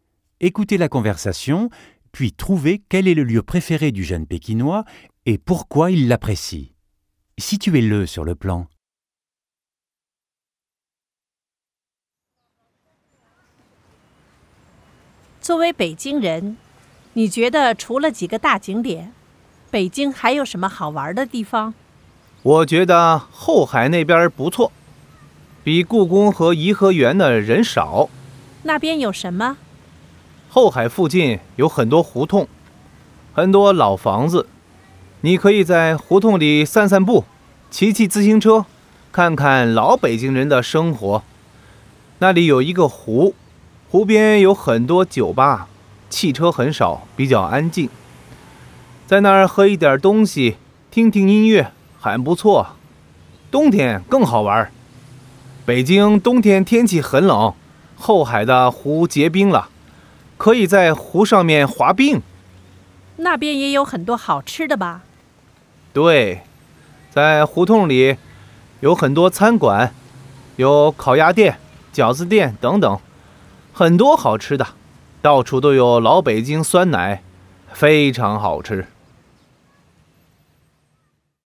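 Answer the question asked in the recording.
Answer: Houhai : il y a moins de monde qu'à la Cité interdite, des hutongs et de vieilles maisons, un lac calme avec des bars, du patin sur le lac en hiver et beaucoup de bons restaurants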